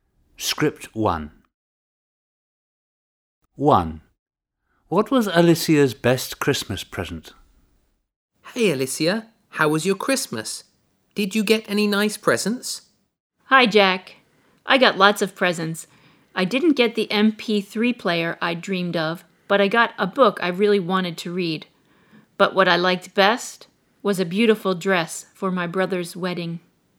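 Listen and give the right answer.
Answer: a beautiful dress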